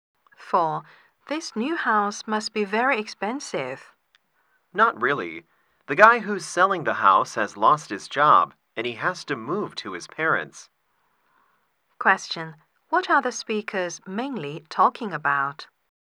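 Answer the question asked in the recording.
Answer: The price of a house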